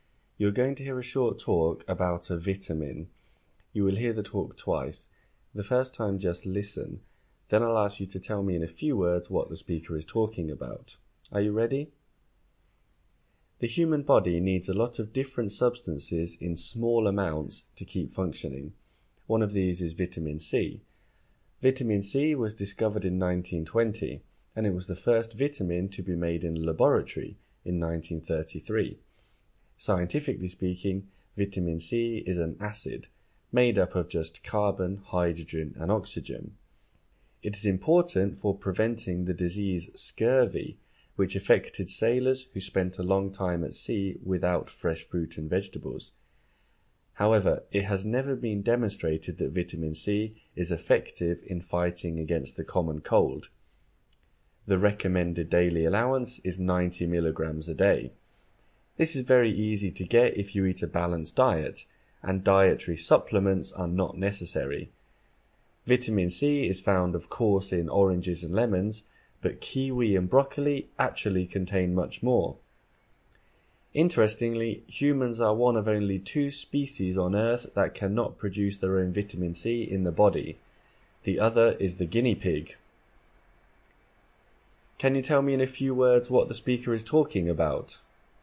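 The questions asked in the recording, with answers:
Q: Can you tell me in a few words what the speaker is talking about?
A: Vitamin C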